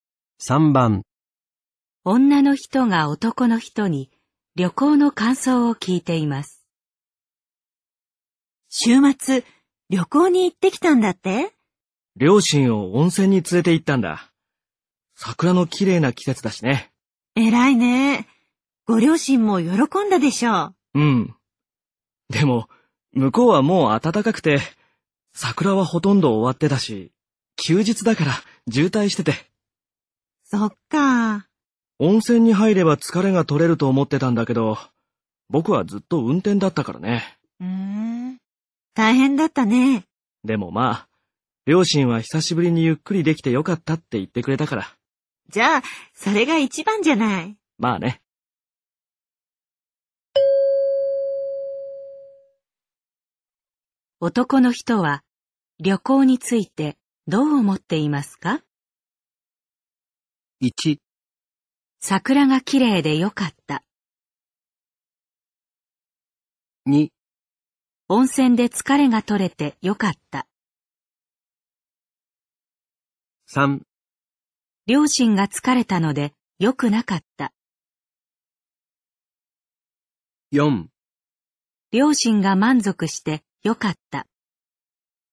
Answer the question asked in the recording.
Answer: 4

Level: N3 Listening · Test 15